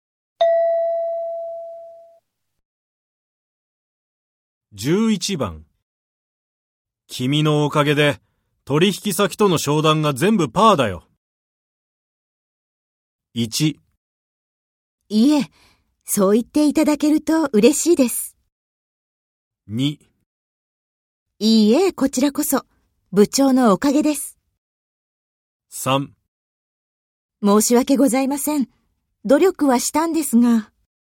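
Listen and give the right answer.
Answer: 3: 申し訳ございません。努力はしたんですが。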